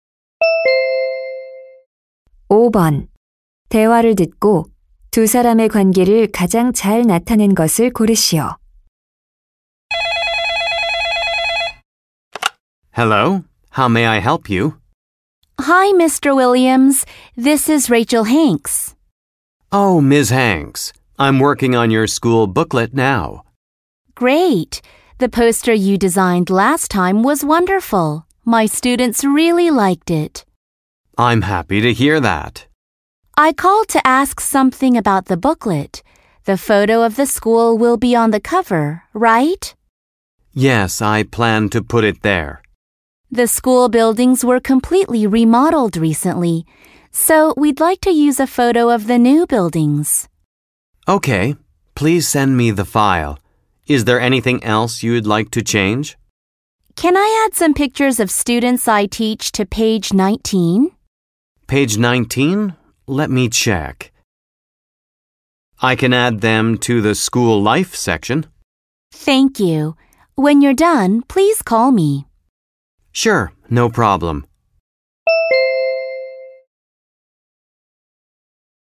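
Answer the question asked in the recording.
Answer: 디자이너 - 교사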